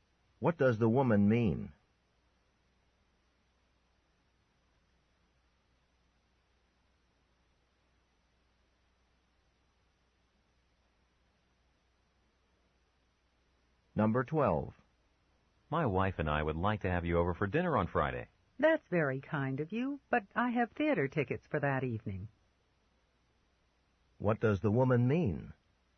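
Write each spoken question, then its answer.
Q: What does the woman mean?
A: She can't come to dinner on Friday.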